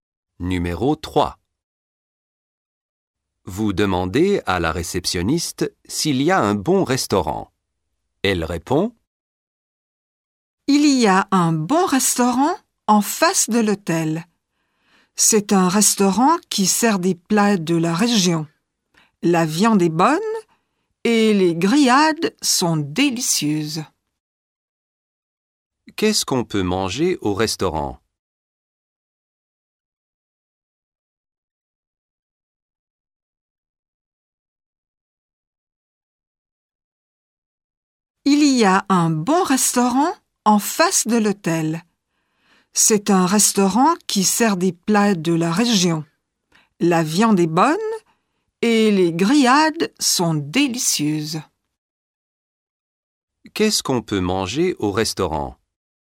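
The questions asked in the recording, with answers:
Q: Qu'est-ce qu'on peut manger au restaurant?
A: De la viande, des grillades (plats de la région)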